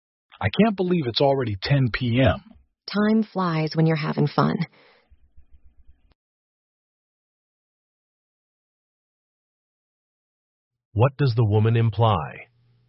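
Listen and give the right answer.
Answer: They have been having fun, so time passed quickly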